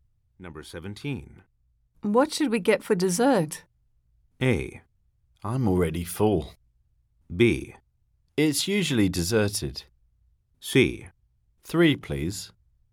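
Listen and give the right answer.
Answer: A: I'm already full.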